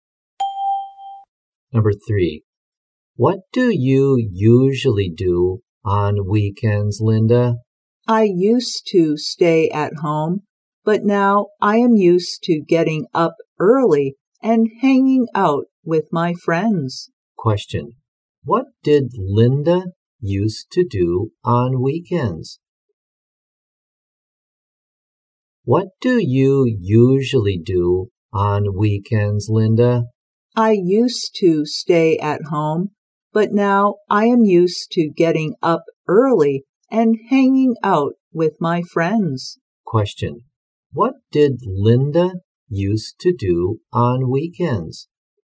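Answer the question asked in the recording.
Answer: Stay at home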